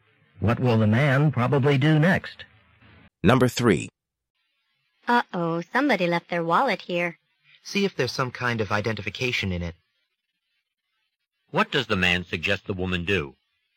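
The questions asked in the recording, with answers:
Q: What does the man suggest the woman do?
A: Look in the wallet for identification.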